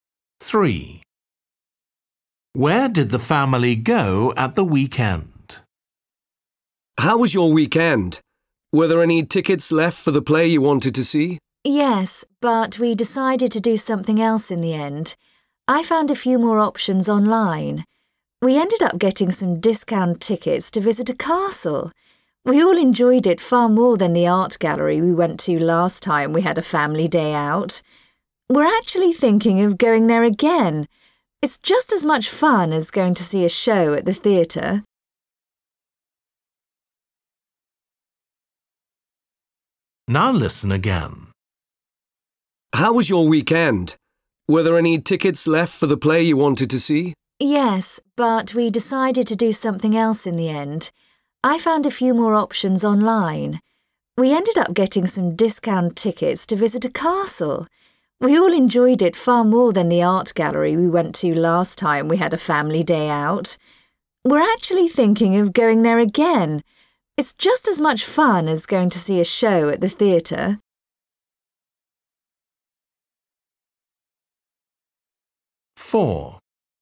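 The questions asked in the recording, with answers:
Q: Where did the family go at the weekend?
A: to a castle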